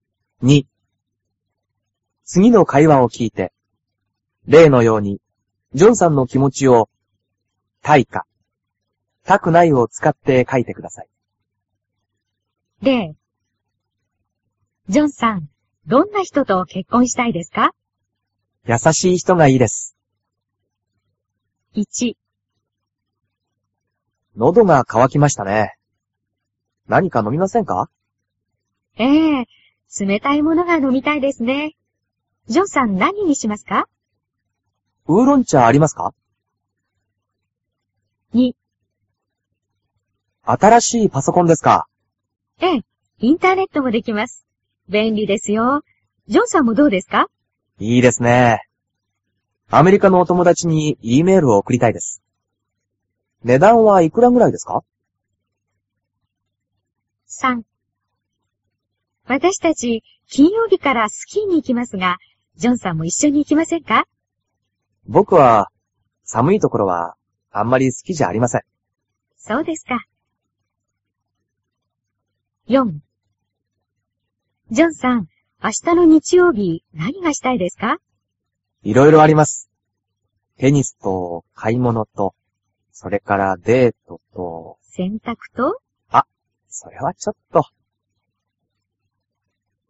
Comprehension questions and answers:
次の会話を聞いて、例のようにジョンさんの気持ちを「~たい」か「~たくない」を使って書いてください。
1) わたしは ウーロンちゃが.......................................。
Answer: のみたいです(ほしいです)

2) わたしは コンピュータが.......................................。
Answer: かいたいです(ほしいです)

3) わたしは スキーに.......................................。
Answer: いきたくないです

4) わたしは テニスと買い物とデートは.......................................が、せんたくは.......................................。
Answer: したいです、したくないです

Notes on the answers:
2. 男:いいですね。アメリカの友だちにEメールを送りたいです。
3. 男:ぼくは、寒いところは、あんまり好きじゃありません。
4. 男:いろいろあります。テニスと買い物とそれからデートと・・・・・。 女:洗濯と? 男:あ、それはちょっと・・・・・。

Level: cơ bản